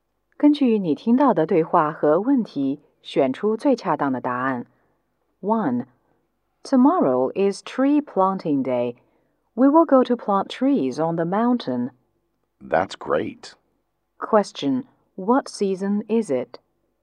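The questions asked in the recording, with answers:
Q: Question, what season is it?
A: Spring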